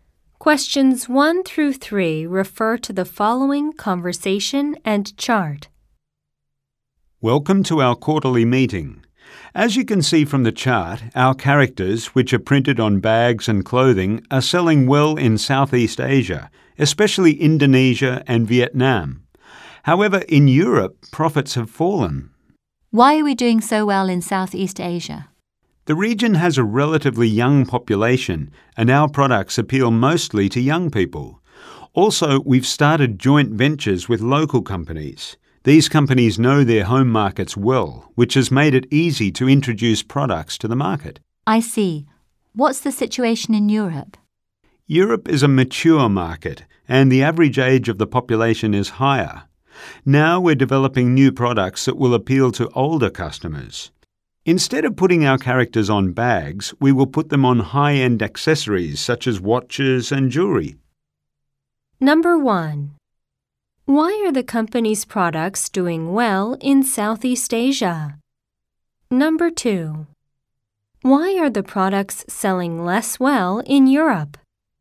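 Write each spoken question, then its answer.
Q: Why are the company's products doing well in Southeast Asia?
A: The region has a young population that likes its products, and it has joint ventures with local companies.

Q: Why are the products selling less well in Europe?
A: Europe is a mature market with an older population.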